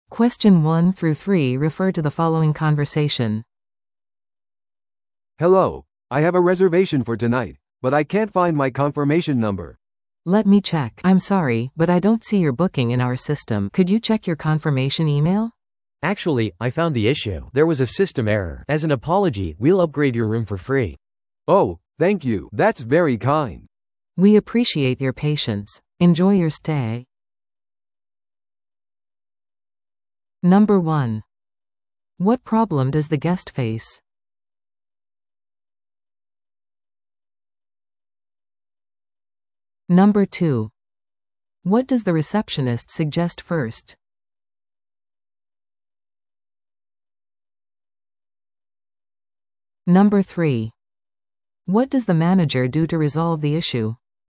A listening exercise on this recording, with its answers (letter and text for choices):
Listen to the audio below and answer the questions.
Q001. 宿泊客はどんな問題に直面していますか?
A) ホテルが満室である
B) 宿泊客の予約が見つからない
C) チェックイン時間が遅れている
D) 二重請求されている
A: B) 宿泊客の予約が見つからない

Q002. フロント係は最初に何を提案しましたか?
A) 予約確認メールをチェックするように伝える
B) 数時間待つように伝える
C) 別の部屋を予約するように提案する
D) 予約サイトに電話するように伝える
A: A) 予約確認メールをチェックするように伝える

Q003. マネージャーはどのように問題を解決しましたか?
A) 無料アップグレードを提供する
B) 宿泊客に退去を求める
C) 予約をキャンセルする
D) 宿泊客に再度料金を請求する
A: A) 無料アップグレードを提供する

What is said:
A: "Hello, I have a reservation for tonight, but I can't find my confirmation number."
B: "Let me check... I'm sorry, but I don't see your booking in our system. Could you check your confirmation email?"
C: "Actually, I found the issue. There was a system error. As an apology, we'll upgrade your room for free."
A: "Oh, thank you! That's very kind."
B: "We appreciate your patience. Enjoy your stay!"